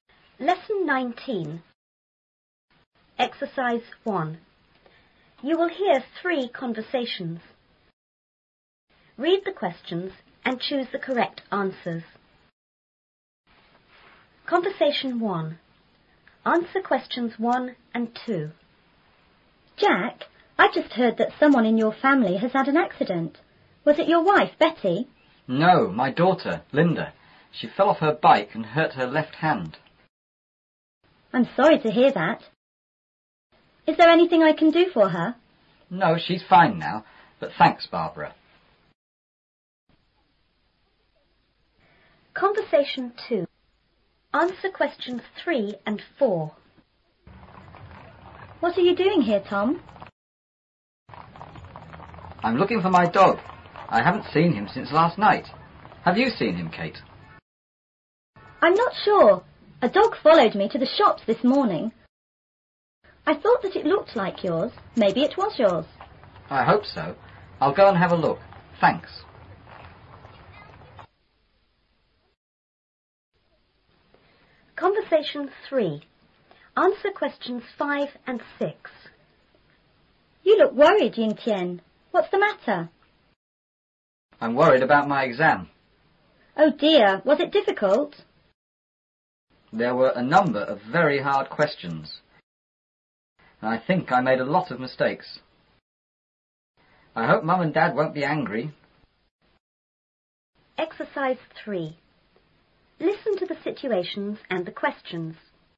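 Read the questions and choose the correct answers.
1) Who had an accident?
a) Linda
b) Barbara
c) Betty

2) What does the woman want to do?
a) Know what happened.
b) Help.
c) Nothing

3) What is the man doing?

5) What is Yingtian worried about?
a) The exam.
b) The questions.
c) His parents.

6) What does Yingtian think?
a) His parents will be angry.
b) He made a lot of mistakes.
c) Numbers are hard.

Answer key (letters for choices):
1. a
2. b
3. Looking for his dog
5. a
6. b

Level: 初中英语广州版4B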